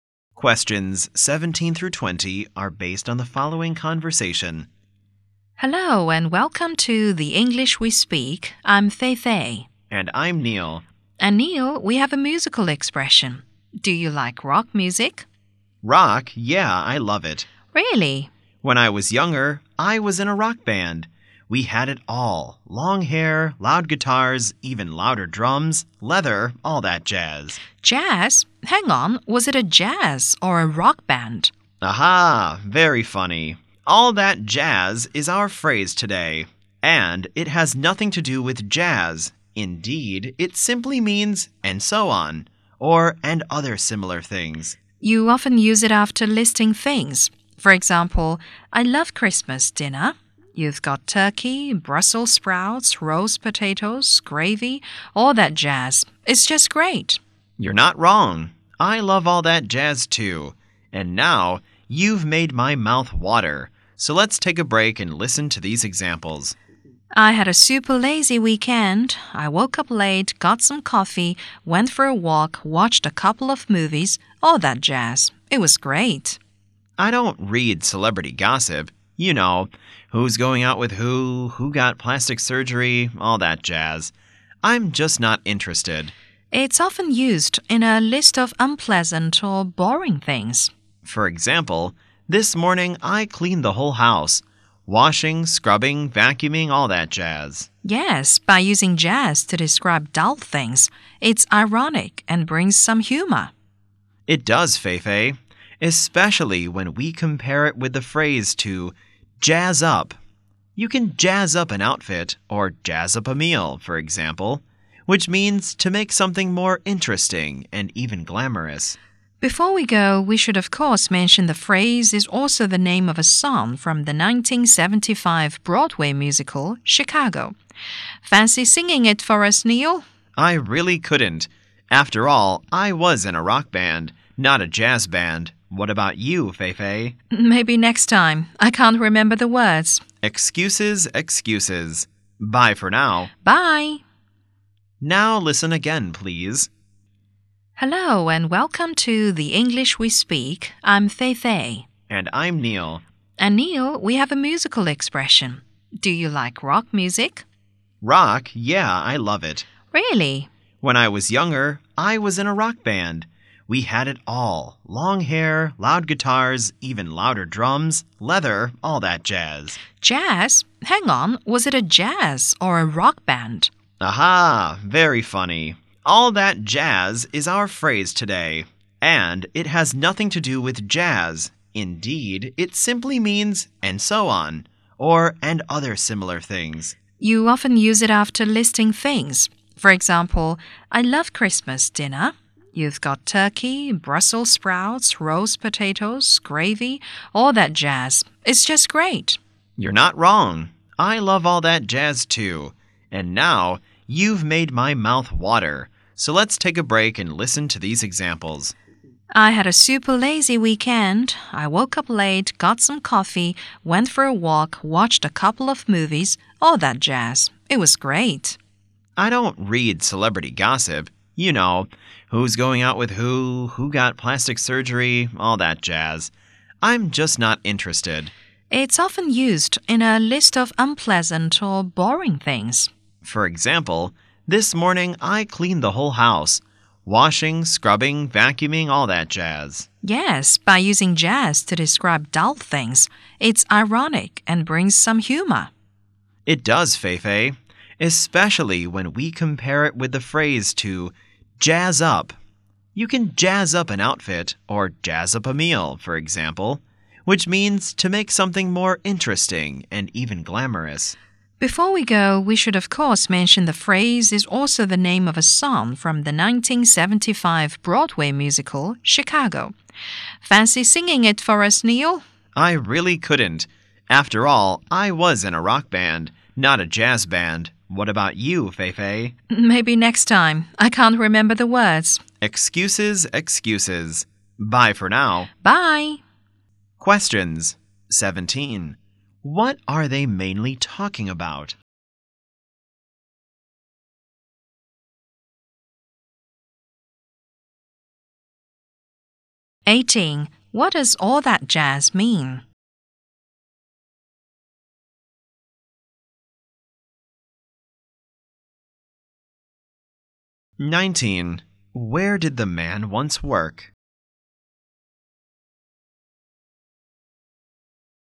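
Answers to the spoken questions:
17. The phrase "all that jazz"
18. And so on, or other similar things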